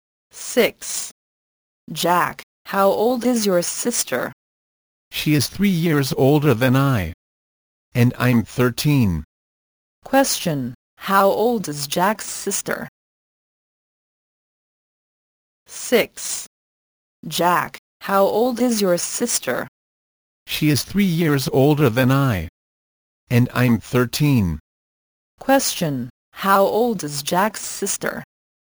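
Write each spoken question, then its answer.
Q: Question, how old is Jack's sister?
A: 16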